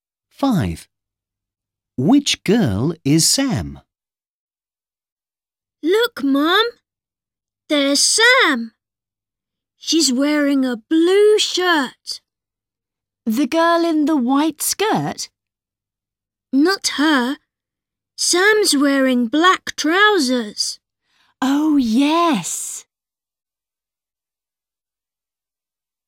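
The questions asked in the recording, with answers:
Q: Which girl is Sam?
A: the girl in a blue shirt and black trousers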